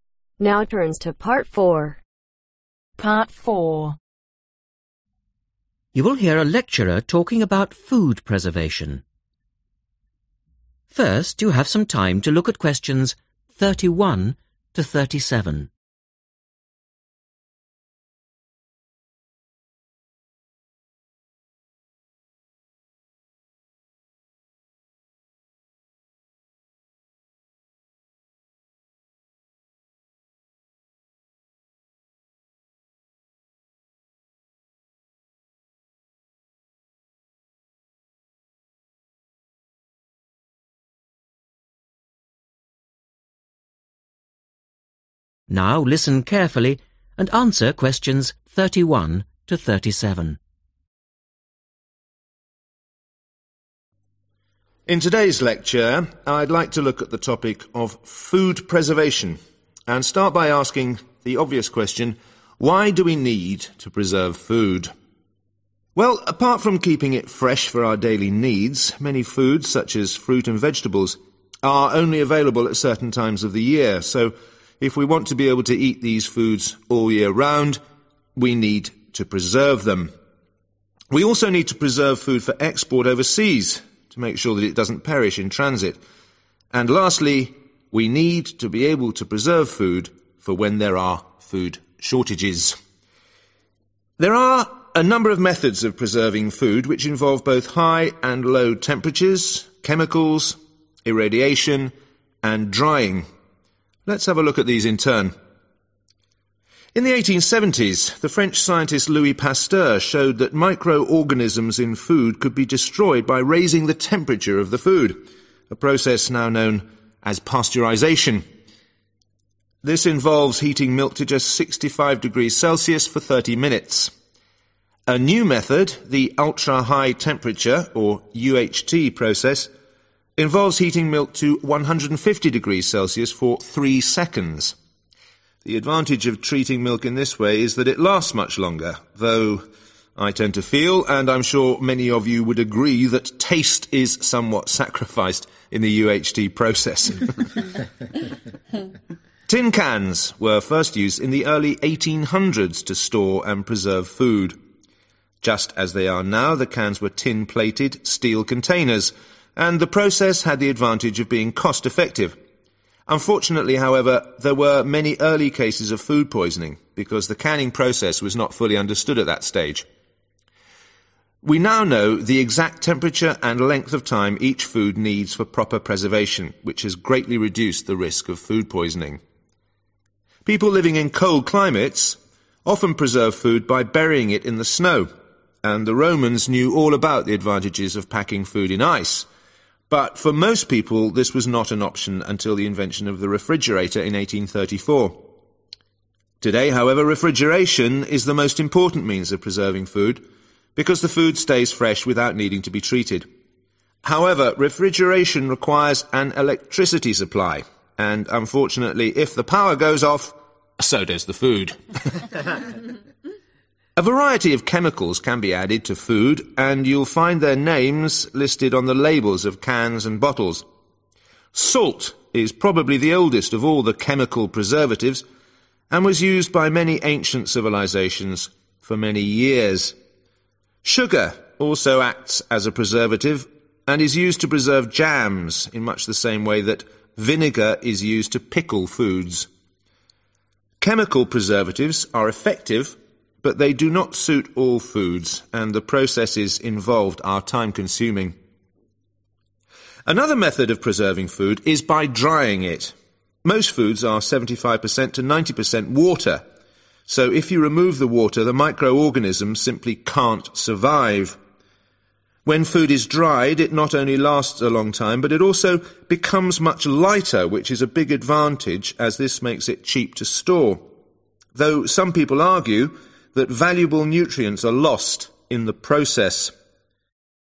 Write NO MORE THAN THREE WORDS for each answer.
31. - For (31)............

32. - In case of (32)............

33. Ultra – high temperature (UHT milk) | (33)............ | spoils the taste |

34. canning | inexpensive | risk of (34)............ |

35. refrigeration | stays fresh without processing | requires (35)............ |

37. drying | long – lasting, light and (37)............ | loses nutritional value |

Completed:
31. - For export/transit (overseas)
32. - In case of food shortages
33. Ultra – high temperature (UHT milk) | lasts longer/lasts much longer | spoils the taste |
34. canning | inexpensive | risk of food-poisoning/poisoning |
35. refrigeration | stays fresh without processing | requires electricity/electricity supply/supply of electricity/power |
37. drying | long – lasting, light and cheap to store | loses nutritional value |